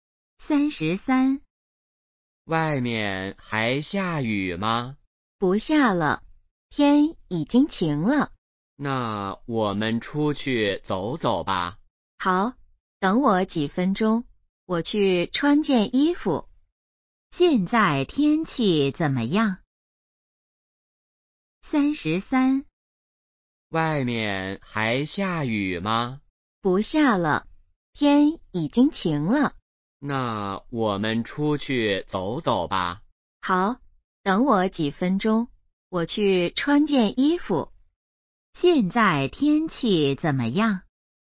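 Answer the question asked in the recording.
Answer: 晴了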